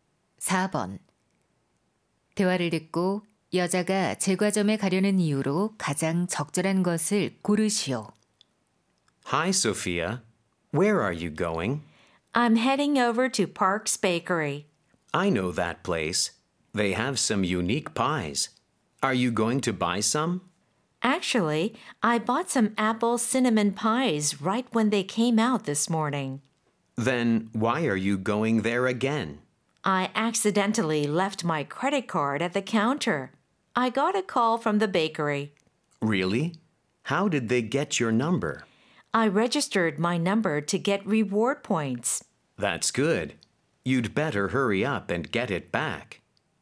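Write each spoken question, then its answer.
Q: 대화를 듣고 여자가 제과점에 가려는 이유로 가장 적절한 것을 고르시오.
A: 두고 온 신용카드를 찾으려고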